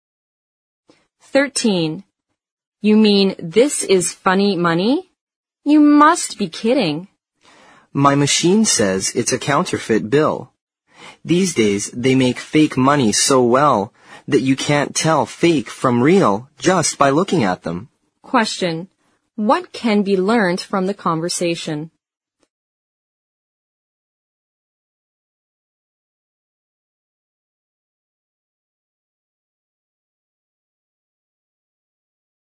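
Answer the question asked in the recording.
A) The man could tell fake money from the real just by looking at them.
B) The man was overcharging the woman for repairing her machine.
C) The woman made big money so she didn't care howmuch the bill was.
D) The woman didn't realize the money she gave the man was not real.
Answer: D) The woman didn't realize the money she gave the man was not real.

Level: 四级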